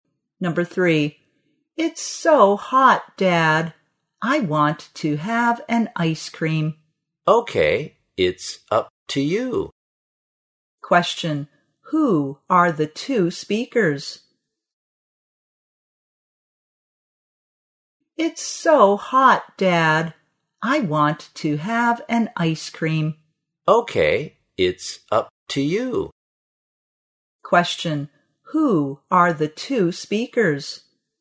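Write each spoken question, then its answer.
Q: who are the two speakers?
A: A child and his/her father.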